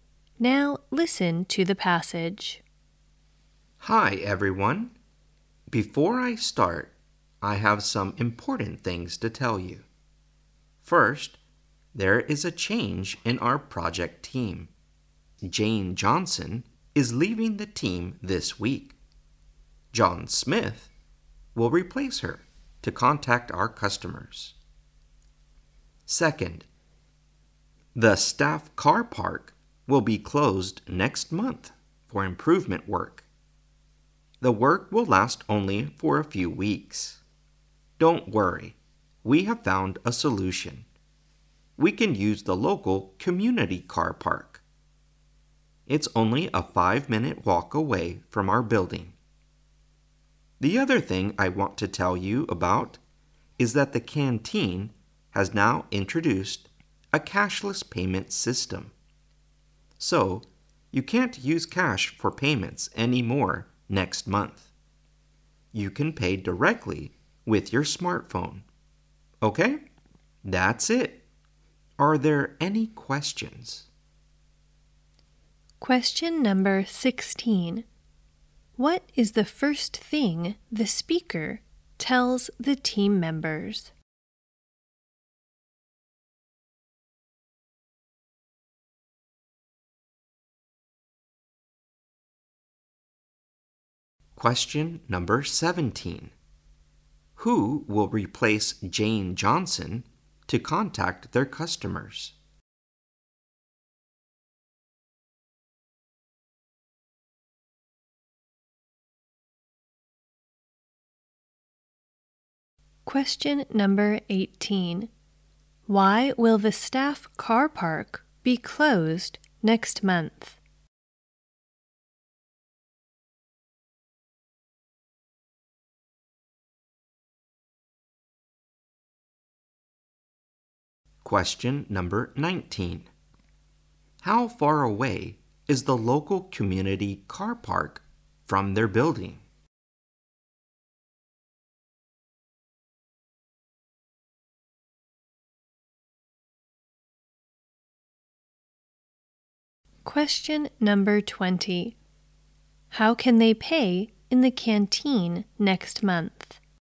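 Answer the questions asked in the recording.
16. A change in the project team
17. John Smith
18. For improvement work
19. A 5-minute walk
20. With their smartphones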